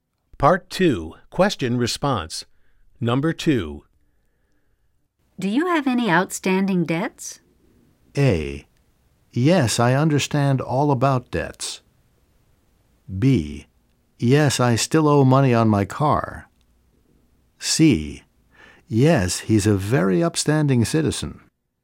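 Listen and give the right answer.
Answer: B: Yes, I still owe money on my car.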